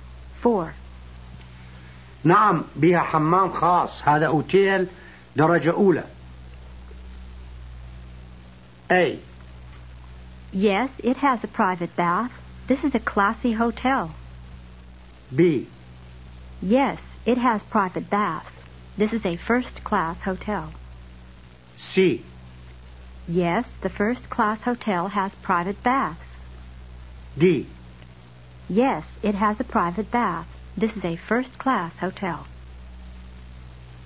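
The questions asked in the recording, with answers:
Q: نعم بها حمام خاص هذا أوتيل درجة أولى.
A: D: Yes, it has a private bath. This is a first-class hotel.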